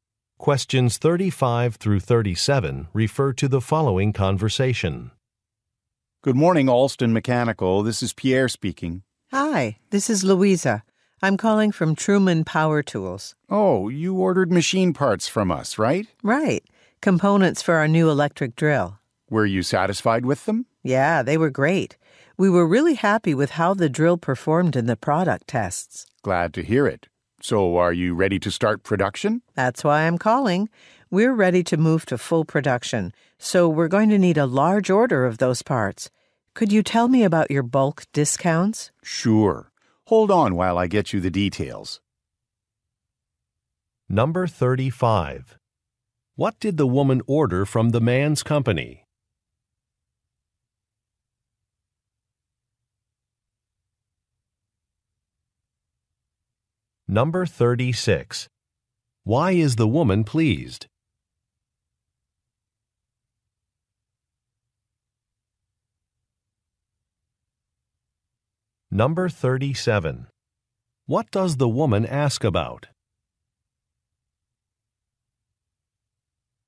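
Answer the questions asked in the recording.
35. Machine parts for an electric drill
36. The drill performed well in product tests
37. Bulk discounts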